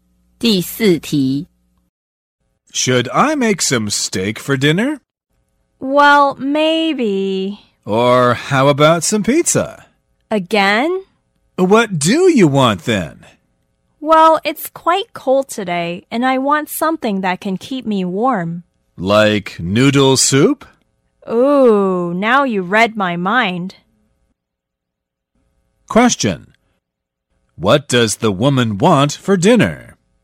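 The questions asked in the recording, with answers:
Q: What does the woman want for dinner?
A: Noodle soup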